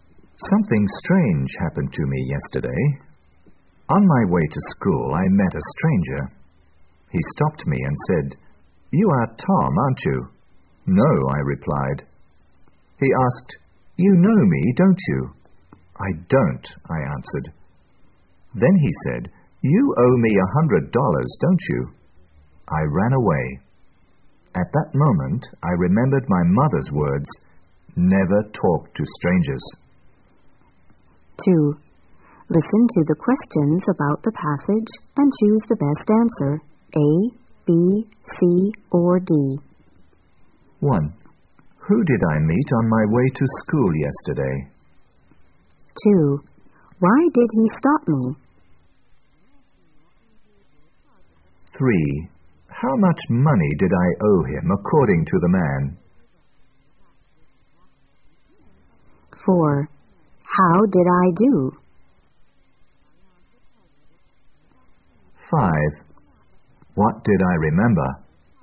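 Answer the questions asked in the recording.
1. A stranger
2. He thought I was Tom
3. $100
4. I ran away
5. My mother's words, "Never talk to strangers."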